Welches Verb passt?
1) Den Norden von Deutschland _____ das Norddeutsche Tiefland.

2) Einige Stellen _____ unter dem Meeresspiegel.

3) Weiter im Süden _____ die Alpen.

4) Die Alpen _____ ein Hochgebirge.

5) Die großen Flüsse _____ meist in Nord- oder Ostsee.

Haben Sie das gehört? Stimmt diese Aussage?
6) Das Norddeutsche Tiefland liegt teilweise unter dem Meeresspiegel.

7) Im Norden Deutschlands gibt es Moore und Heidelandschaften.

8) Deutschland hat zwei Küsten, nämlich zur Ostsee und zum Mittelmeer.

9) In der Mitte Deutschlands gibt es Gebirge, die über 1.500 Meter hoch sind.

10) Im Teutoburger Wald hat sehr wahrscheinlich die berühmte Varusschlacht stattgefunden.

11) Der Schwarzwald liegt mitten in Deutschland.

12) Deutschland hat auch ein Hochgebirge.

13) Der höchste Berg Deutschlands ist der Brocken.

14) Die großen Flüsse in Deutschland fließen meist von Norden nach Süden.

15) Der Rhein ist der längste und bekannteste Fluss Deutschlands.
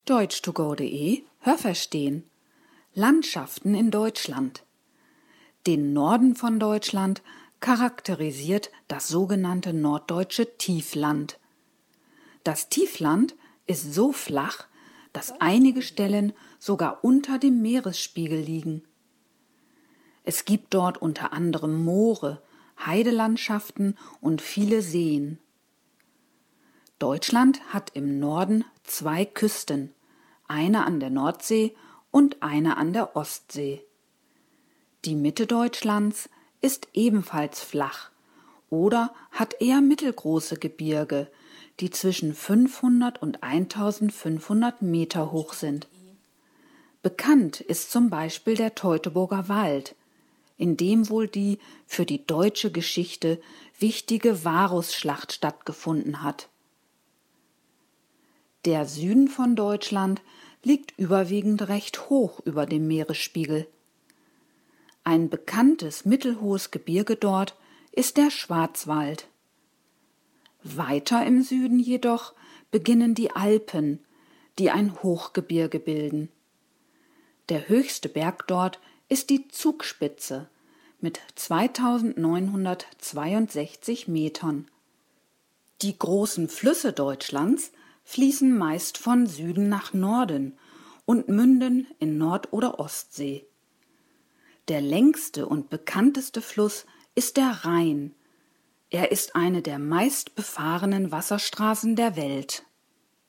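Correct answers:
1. charakterisiert
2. liegen
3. beginnen
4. bilden
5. münden
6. Richtig
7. Richtig
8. Falsch
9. Falsch
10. Richtig
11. Falsch
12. Richtig
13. Falsch
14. Falsch
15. Richtig

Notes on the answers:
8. Es gibt eine Küste zur Ostsee und zur Nordsee.
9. Diese Mittelgebirge sind zwischen 500 und 1.500 Meter hoch.
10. In der Schlacht wurden vor über 2.000 Jahren die Römer von den Germanen besiegt.
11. Er liegt im Süden des Landes.
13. Es ist die Zugspitze.
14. Sie fließen meist von Süden nach Norden.

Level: B (mittel)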